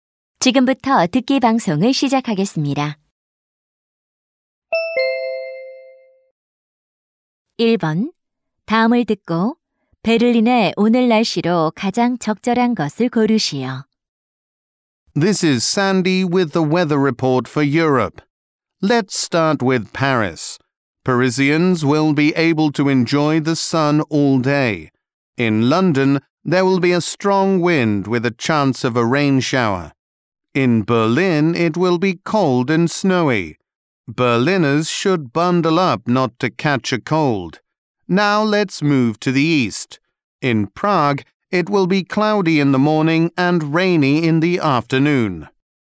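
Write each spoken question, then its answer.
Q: 다음을 듣고 베를린의 오늘 날씨로 가장 적절한 것을 고르시오.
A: 춥고 눈이 옴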